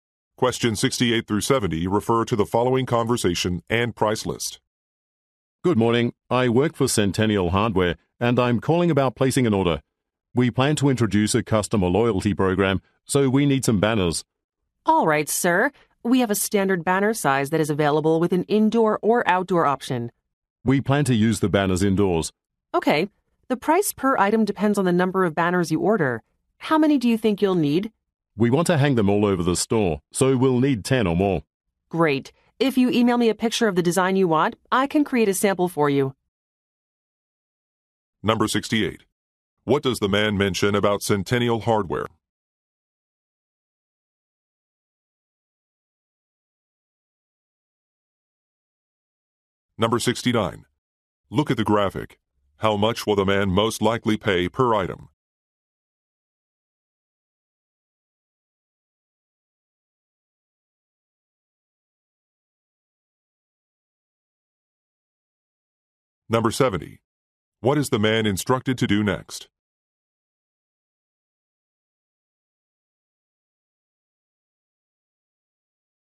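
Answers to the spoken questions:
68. It plans to introduce a customer loyalty program
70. Email a picture of the design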